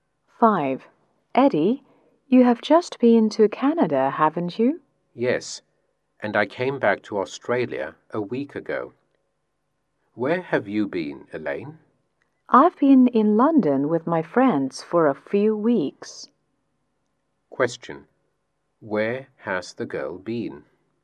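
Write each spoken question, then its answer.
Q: Where has the girl been?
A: London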